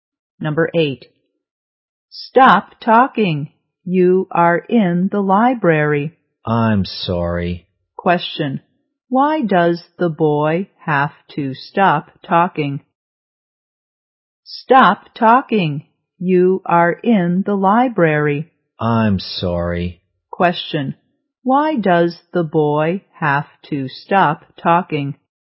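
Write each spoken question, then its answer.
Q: Why does the boy have to stop talking?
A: He is in the library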